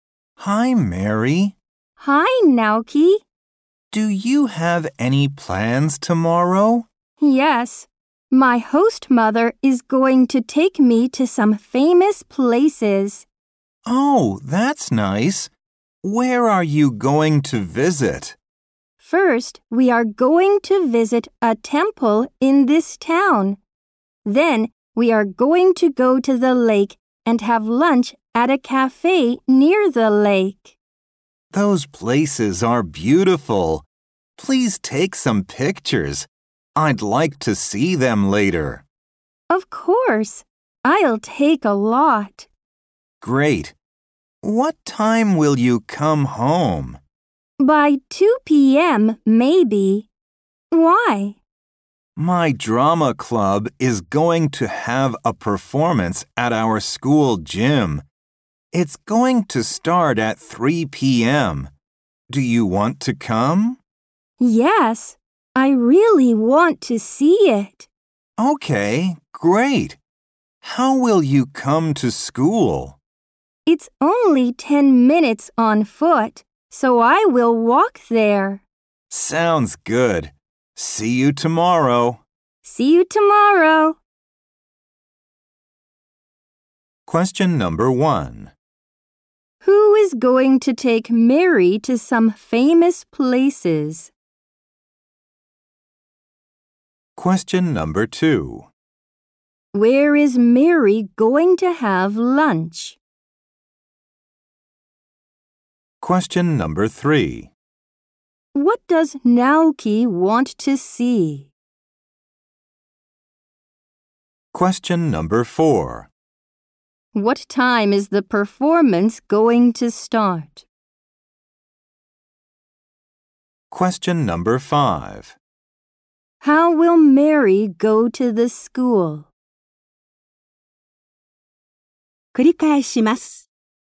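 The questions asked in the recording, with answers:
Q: Who is going to take Mary to some famous places?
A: Her host mother

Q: Where is Mary going to have lunch?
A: At a cafe near the lake

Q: What does Naoki want to see?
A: Mary's pictures

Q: What time is the performance going to start?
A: At 3 p.m.

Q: How will Mary go to the school?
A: She will walk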